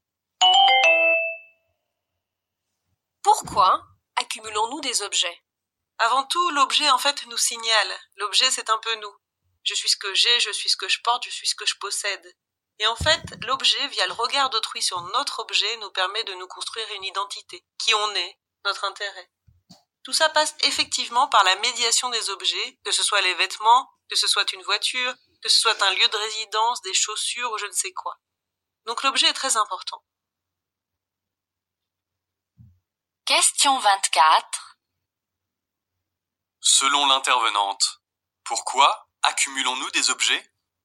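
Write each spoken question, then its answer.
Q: Selon l'intervenante, pourquoi accumulons-nous des objets ?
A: Pour nous construire une identité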